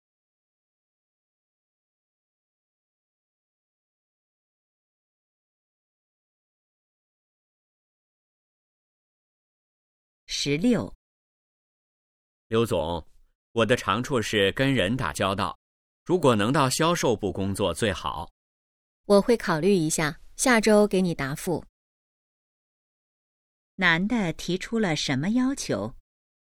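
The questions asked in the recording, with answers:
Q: 男的提出了什么要求?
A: 去销售部工作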